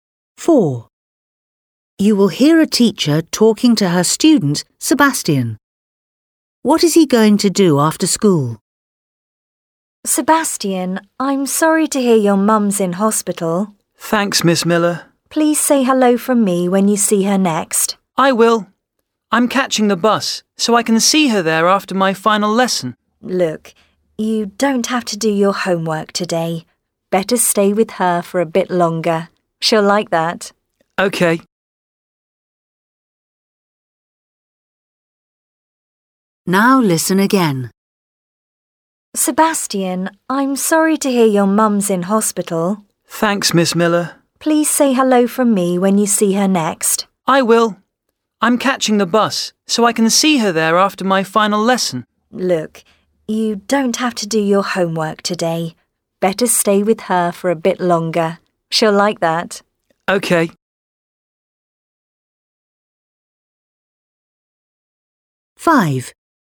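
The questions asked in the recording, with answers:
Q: What is he going to do after school?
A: visit his mum in hospital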